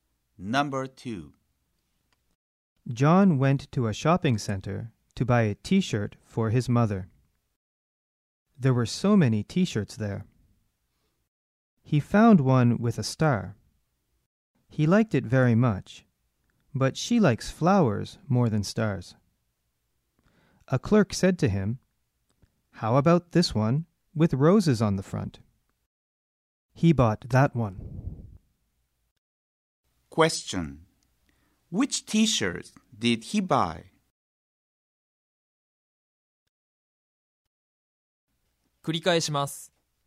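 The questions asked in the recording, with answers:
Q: Question. Which t-shirt did he buy?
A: The one with roses on the front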